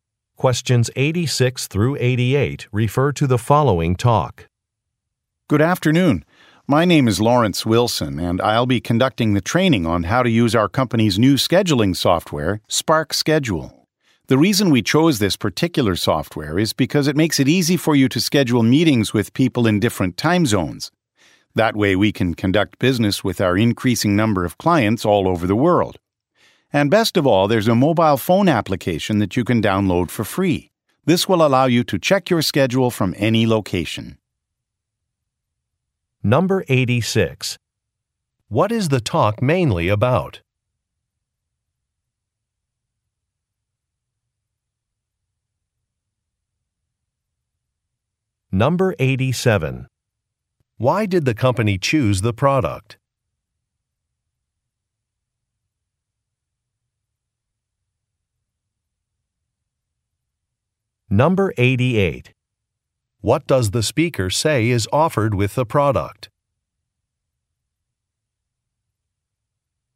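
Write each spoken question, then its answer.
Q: What is the talk mainly about?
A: Training on new scheduling software

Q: Why did the company choose the product?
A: It makes it easy to schedule meetings with people in different time zones

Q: What does the speaker say is offered with the product?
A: A free mobile phone application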